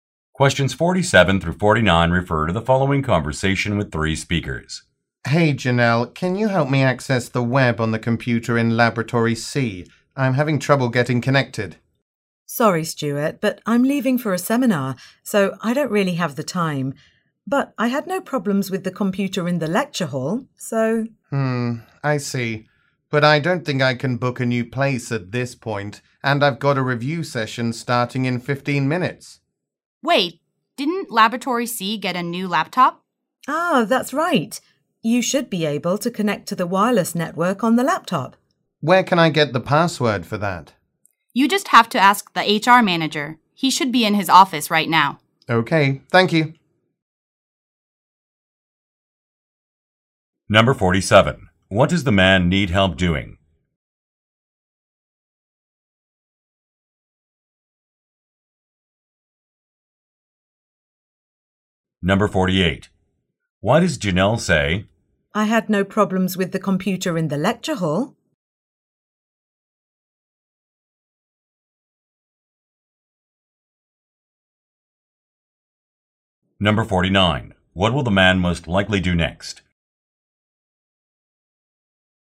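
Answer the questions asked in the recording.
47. Connecting to the internet on a lab computer
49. Ask the HR manager for the password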